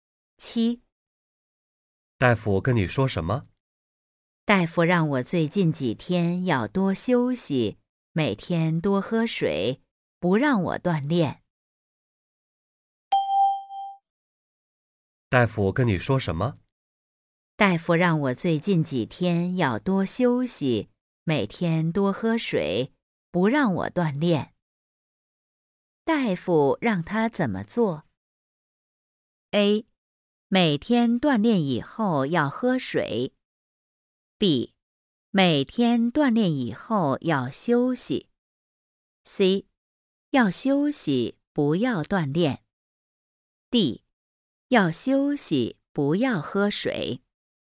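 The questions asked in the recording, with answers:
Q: 大夫让他怎么做?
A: C: 要休息不要锻炼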